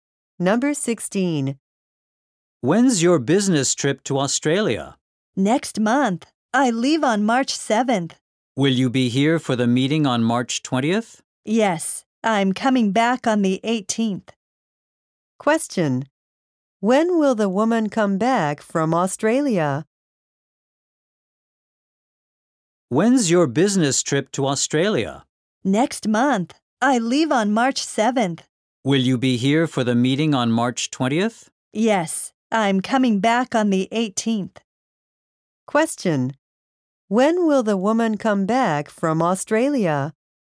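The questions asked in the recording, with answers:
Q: When will the woman come back from Australia?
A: On March 18th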